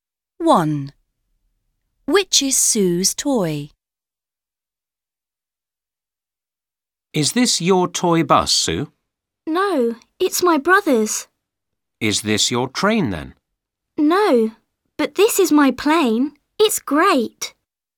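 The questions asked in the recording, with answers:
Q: Which is Sue's toy?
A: a plane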